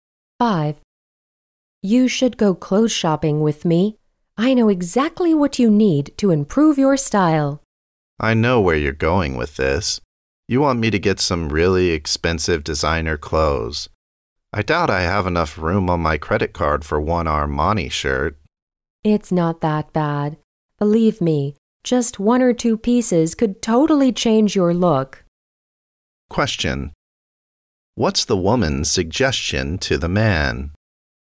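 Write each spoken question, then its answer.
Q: What's the woman's suggestion to the man?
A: Buy one or two designer pieces to improve his style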